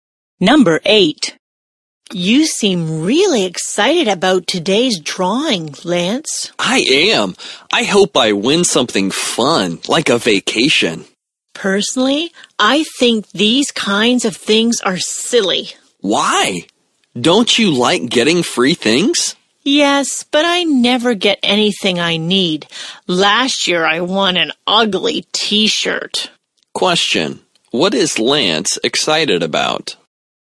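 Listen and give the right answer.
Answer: Today's drawing, where he hopes to win something fun like a vacation.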